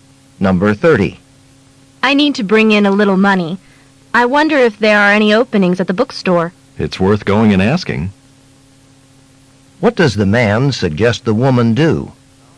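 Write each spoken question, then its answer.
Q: What does the man suggest the woman do?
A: Ask at the bookstore about jobs.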